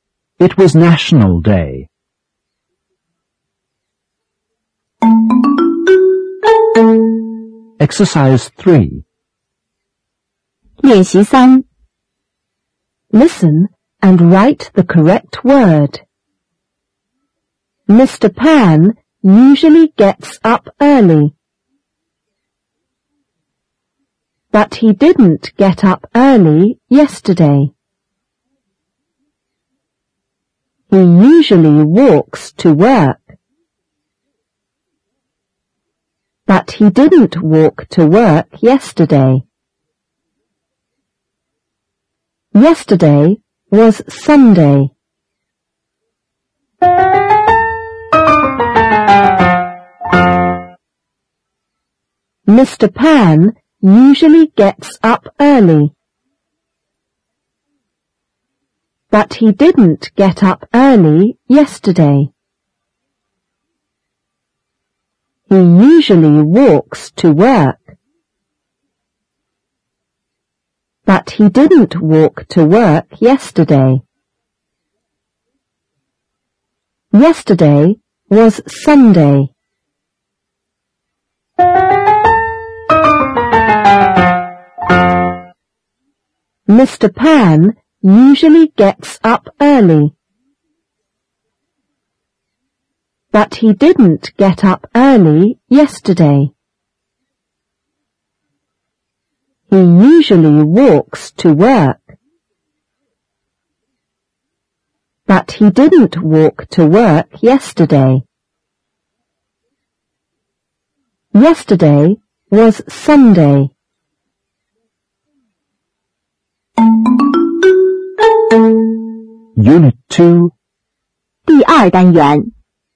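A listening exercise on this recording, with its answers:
3. Listen and write the correct word.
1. Mr Pan usually ______ up early.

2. But the didn't _____ up early yesterday.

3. He usually ______ to work .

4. But he didn't ________to work yesterday.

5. Yesterday _______ Sunday.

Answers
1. gets
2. get
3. walks
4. walk
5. was

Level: 第七册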